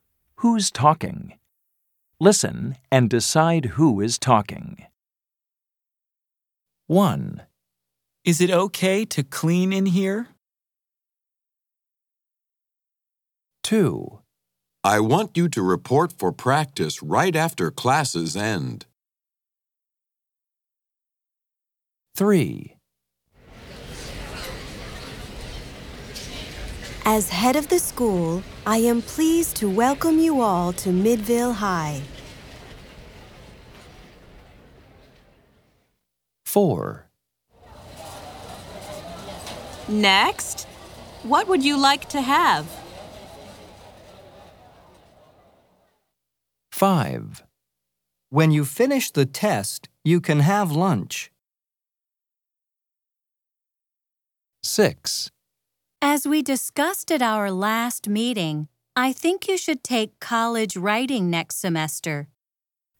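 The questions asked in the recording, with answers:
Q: Who's talking? Listen and decide who is talking.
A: a coach

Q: Who's talking? Listen and decide who is talking.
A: the principal

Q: Who's talking? Listen and decide who is talking.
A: a teacher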